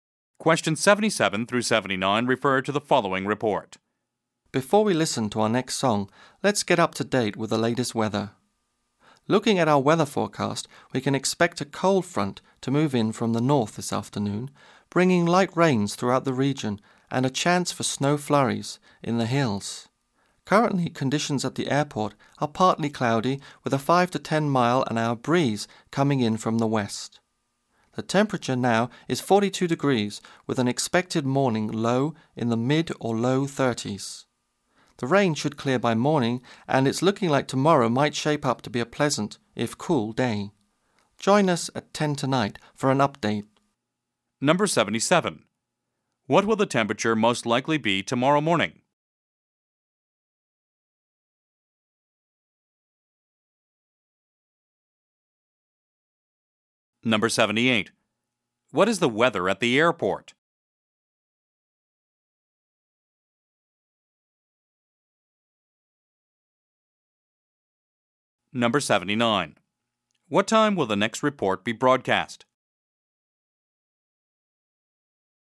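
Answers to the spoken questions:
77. In the low or mid 30s
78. Partly cloudy with a light west breeze
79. At 10 tonight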